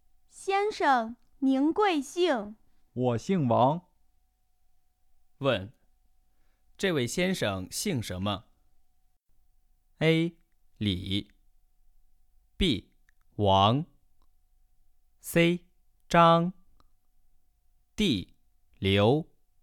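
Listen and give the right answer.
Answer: B: 王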